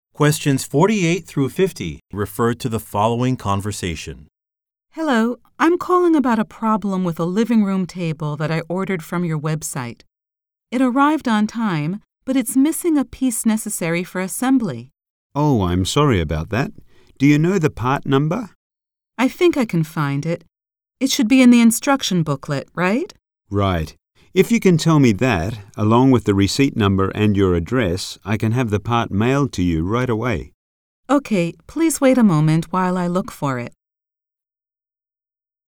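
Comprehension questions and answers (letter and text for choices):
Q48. Who most likely is the man?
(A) A data security specialist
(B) A mechanic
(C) A customer service representative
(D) A furniture designer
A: (C) A customer service representative

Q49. What does the woman mean when she says, "I think I can find it"?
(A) She can get a sales receipt.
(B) She can order a product online.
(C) She can call a manufacturer.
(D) She can locate some information.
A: (D) She can locate some information.

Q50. What does the man offer to do?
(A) Explain an assembly procedure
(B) Arrange for a delivery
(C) Mail a new booklet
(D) Call the woman back later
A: (B) Arrange for a delivery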